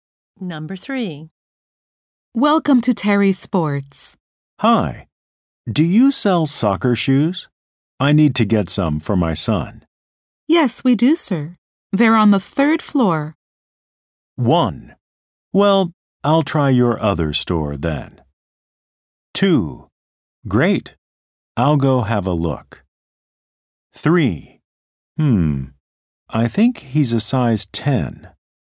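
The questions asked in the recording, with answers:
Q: Yes, we do, sir. They're on the 3rd floor.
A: 2: Great. I'll go have a look.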